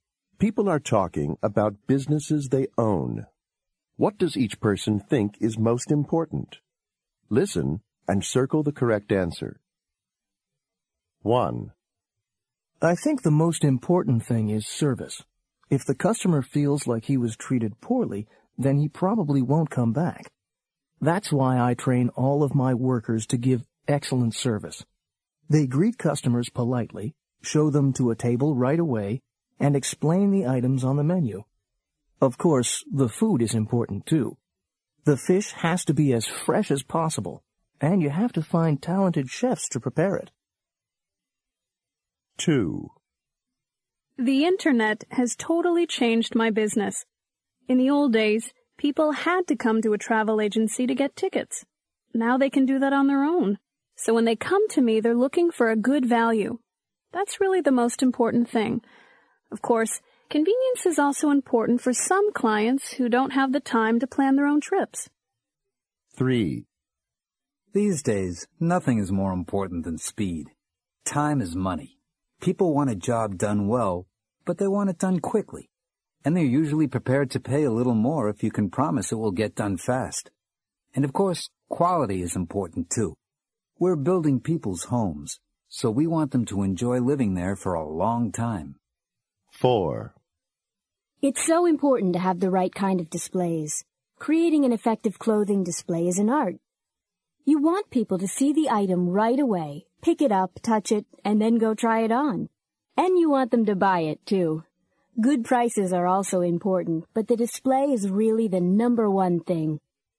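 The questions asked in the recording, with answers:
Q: What does each person think is most important?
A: Service

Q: What does each person think is most important?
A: Good value

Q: What does each person think is most important?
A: Speed

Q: What does each person think is most important?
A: The displays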